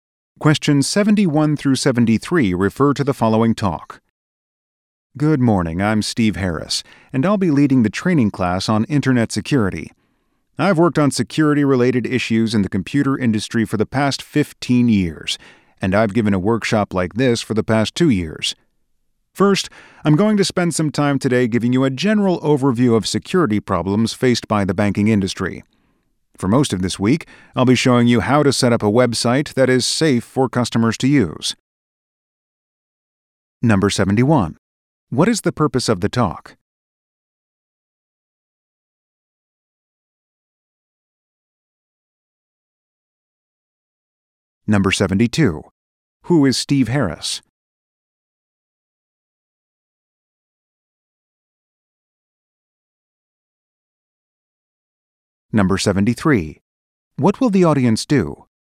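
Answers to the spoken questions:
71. To introduce a training class on Internet security
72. A computer security expert leading the training class
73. Learn how to set up a website that is safe for customers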